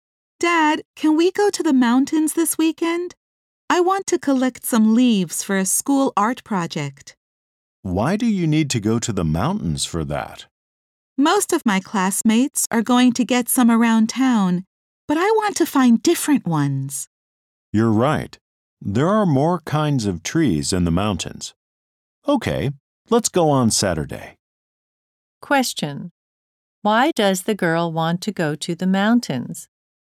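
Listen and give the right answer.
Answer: To find different kinds of leaves for a school art project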